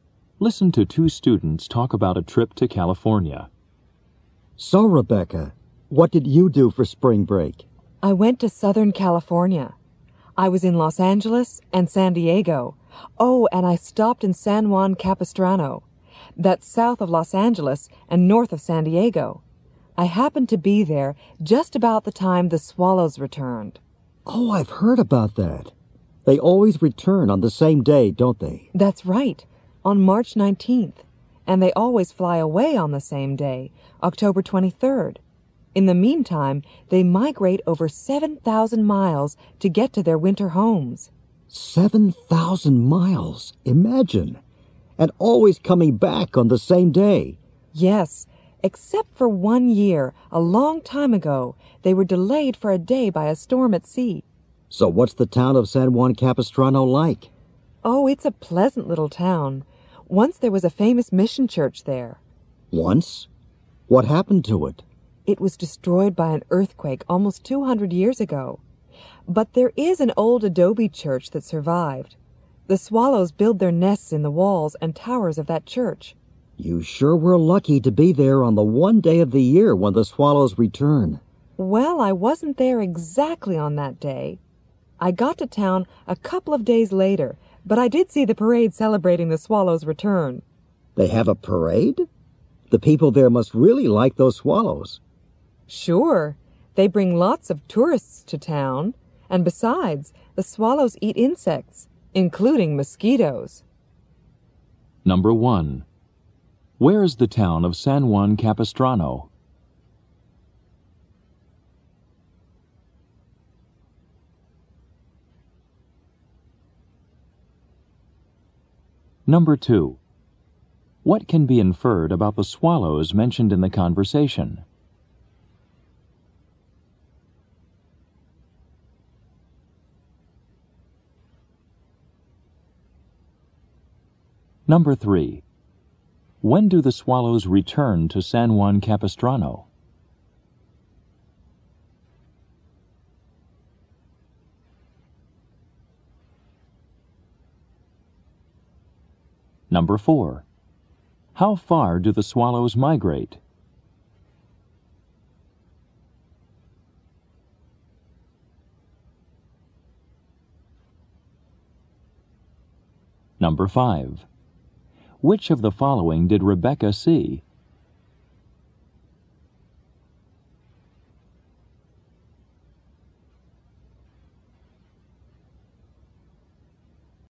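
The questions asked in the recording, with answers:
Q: Where is the town of San Juan Capistrano?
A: South of Los Angeles and north of San Diego

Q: When do the swallows return to San Juan Capistrano?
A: On March 19th

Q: How far do the swallows migrate?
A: Over 7,000 miles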